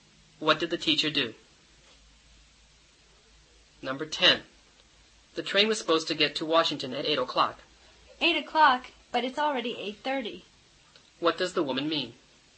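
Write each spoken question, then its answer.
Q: What does the woman mean?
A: The train is late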